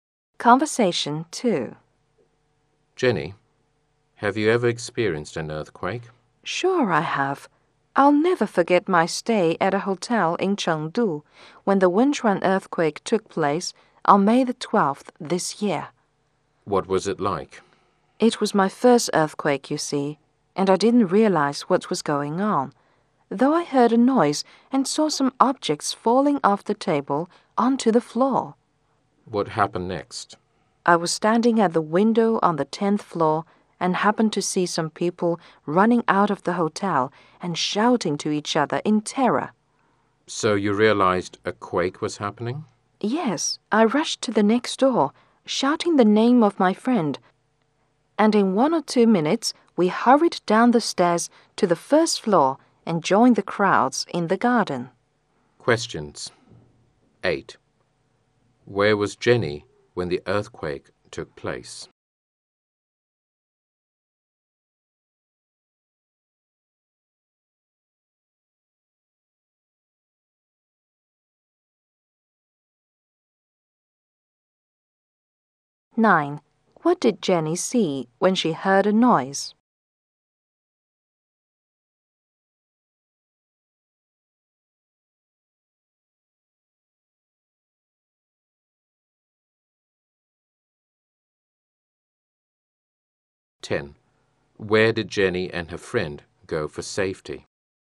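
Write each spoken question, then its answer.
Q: Where was Jenny when the earthquake took place?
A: In a hotel in Chengdu

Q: What did Jenny see when she heard a noise?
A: Objects falling off the table onto the floor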